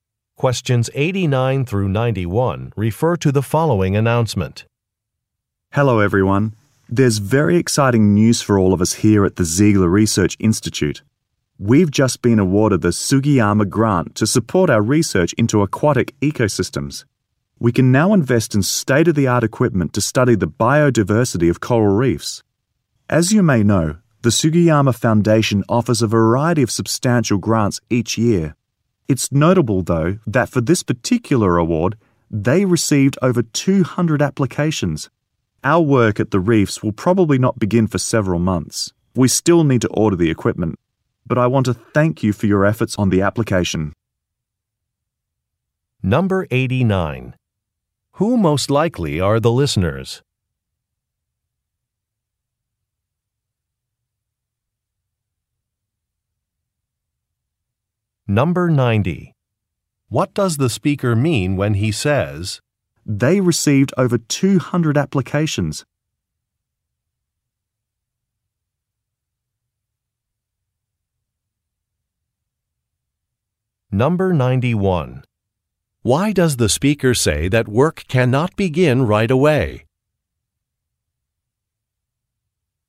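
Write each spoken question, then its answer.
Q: Who most likely are the listeners?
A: Researchers

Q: "They received over 200 applications"?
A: Winning the grant is a big achievement

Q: Why does the speaker say that work cannot begin right away?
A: Equipment still needs to be ordered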